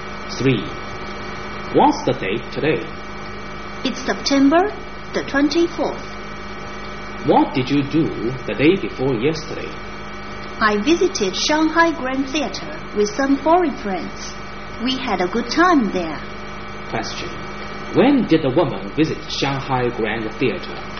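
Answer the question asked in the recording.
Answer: On September 22nd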